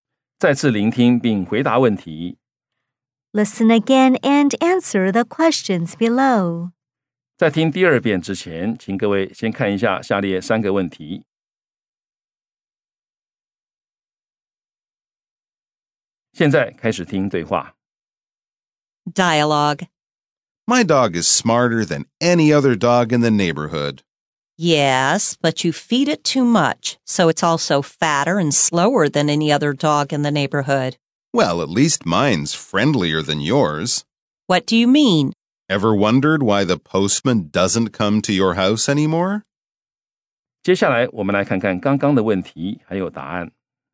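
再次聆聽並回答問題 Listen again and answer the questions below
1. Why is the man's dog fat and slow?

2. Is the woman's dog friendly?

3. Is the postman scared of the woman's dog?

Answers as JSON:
{"1": "Because he feeds it too much.", "2": "No, her dog is not friendly.", "3": "Yes, the postman is scared of her dog."}

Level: 中階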